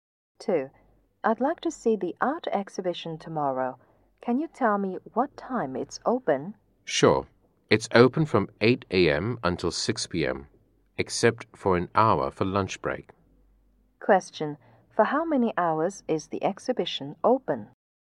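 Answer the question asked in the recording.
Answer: 9 hours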